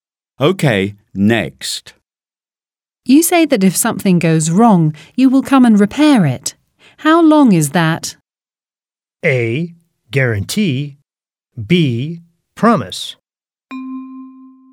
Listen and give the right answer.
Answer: A is correct. Guarantee.